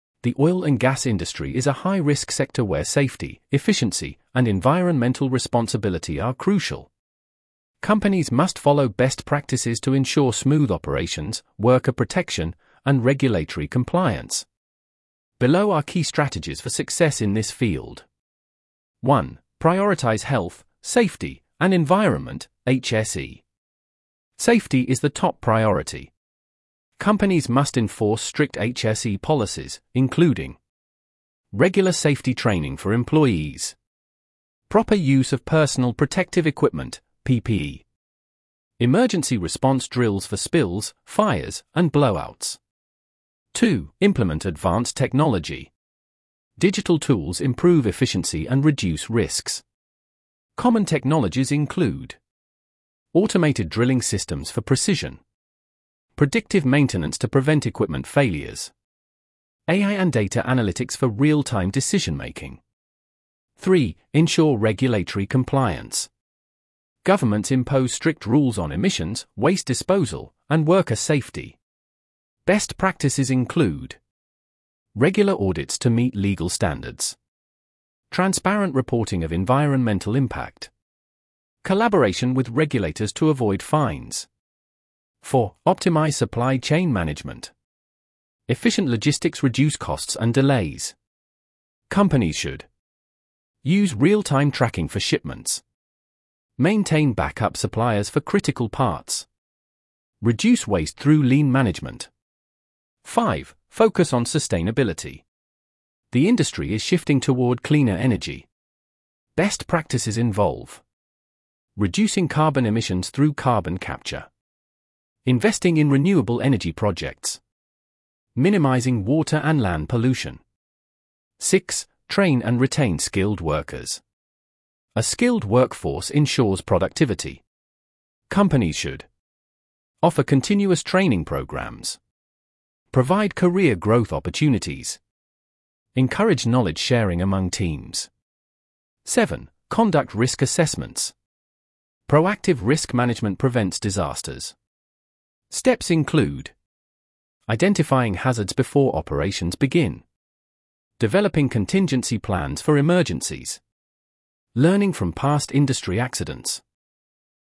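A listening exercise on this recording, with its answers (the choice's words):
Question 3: According to the audio you listened to, what is the top priority in the oil and gas industry?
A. Profit maximization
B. Fast production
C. Reducing workforce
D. Health, Safety, and Environment (HSE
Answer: Health, Safety, and Environment (HSE

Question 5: According to the audio that you listened to, what is a major trend in the oil and gas sector?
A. Shifting toward cleaner energy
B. Avoiding technology upgrades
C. Ignoring environmental concerns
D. Reducing safety measures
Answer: Shifting toward cleaner energy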